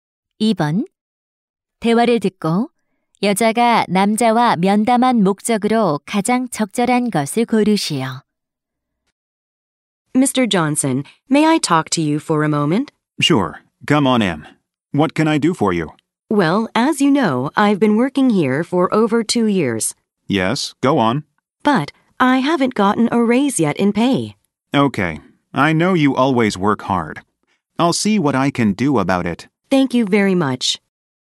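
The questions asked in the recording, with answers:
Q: 대화를 듣고 여자가 남자와 면담한 목적으로 가장 적절한 것을 고르시오.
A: 임금 인상 요청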